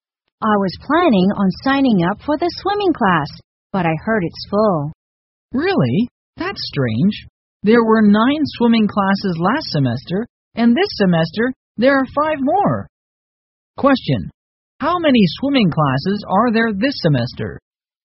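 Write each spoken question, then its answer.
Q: How many swimming classes are there this semester?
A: 14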